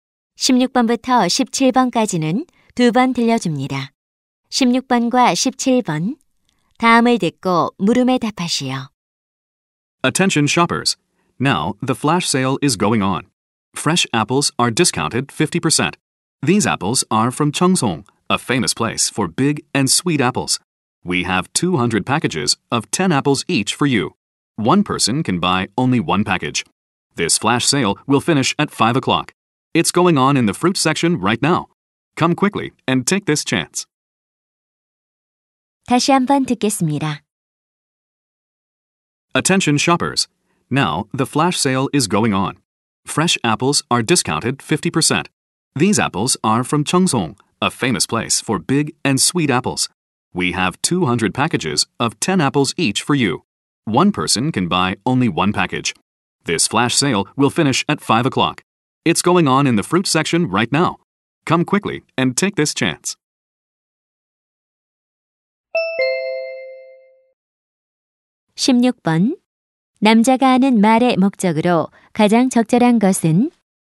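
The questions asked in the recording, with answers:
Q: 남자가 하는 말의 목적으로 가장 적절한 것은?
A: 사과 반짝 할인 판매를 안내하려고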